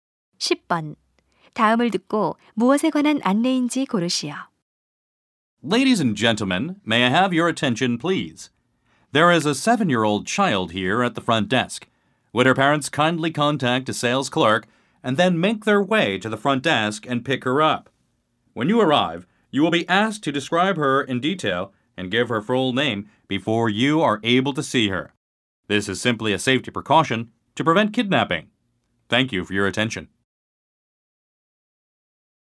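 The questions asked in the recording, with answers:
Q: 다음을 듣고 무엇에 관한 안내인지 고르시오.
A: 미아 보호 안내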